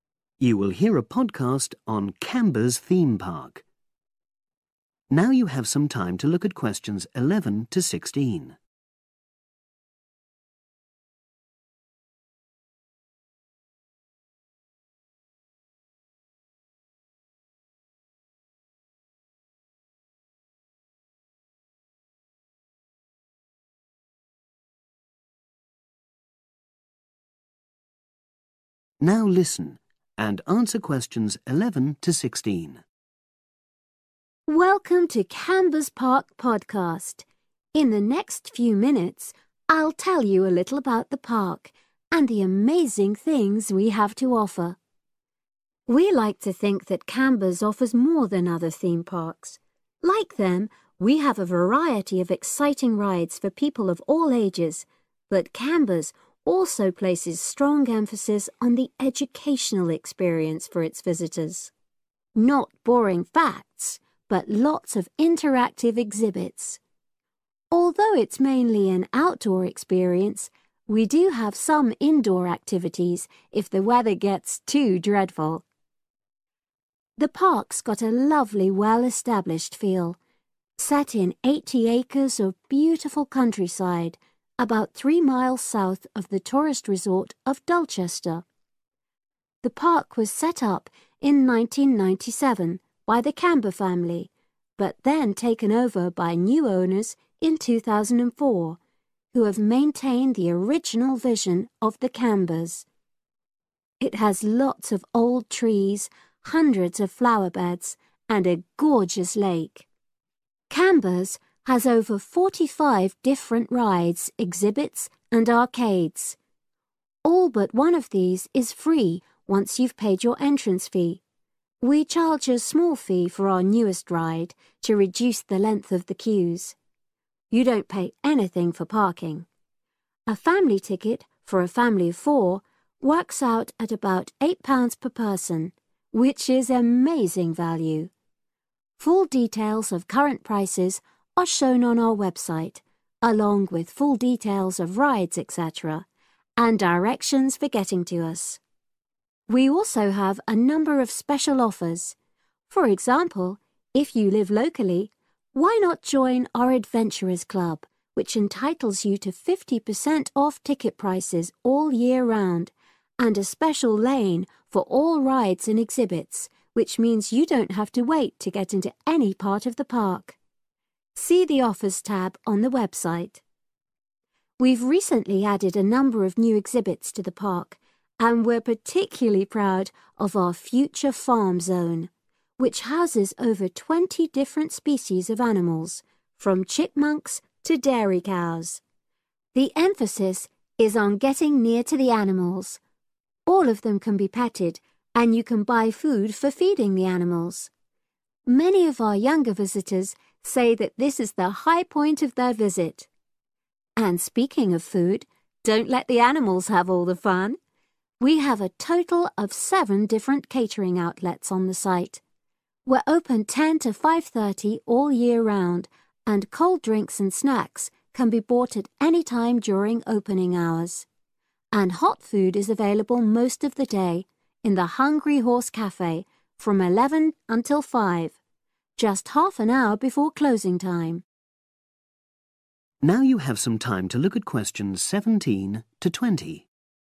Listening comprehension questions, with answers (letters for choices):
Choose the correct answer, A, B or C.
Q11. According to the speaker, in what way is Camber's different from other theme parks?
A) It's suitable for different age groups.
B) It offers lots to do in wet weather.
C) It has a focus on education.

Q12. The Park first opened in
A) 1980.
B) 1997.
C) 2004.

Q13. What's included in the entrance fee?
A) most rides and parking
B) all rides and some exhibits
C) parking and all rides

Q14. Becoming a member of the Adventurers Club means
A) you can avoiding queuing so much.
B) you can enter the Park free for a year.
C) you can visit certain zones closed to other people.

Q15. The Future Farm zone encourages visitors to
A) buy animals as pets.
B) learn about the care of animals.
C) get close to the animals.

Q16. When is hot food available in the park?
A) 10.00 a.m. - 5.30 p.m.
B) 11.00 a.m. - 5.00 p.m.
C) 10.30 a.m. - 5.00 p.m.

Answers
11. C
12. B
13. A
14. A
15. C
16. B